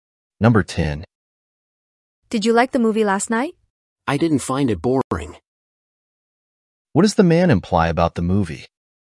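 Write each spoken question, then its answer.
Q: What does the man imply about the movie?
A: He found it interesting/enjoyed it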